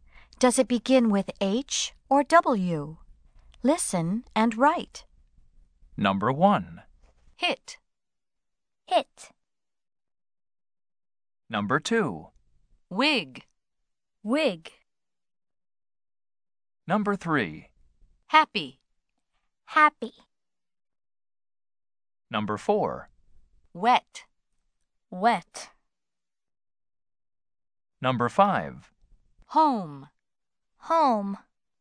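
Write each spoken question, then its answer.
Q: Does it begin with H or W?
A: H (hit)

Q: Does it begin with H or W?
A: W (wig)

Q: Does it begin with H or W?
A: H (happy)

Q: Does it begin with H or W?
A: W (wet)

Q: Does it begin with H or W?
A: H (home)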